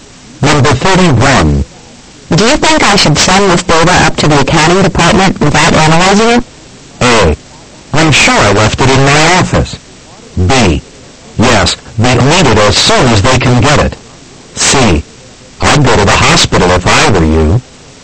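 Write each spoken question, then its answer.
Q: Do you think I should send this data up to the accounting department without analyzing it?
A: B: Yes, they need it as soon as they can get it.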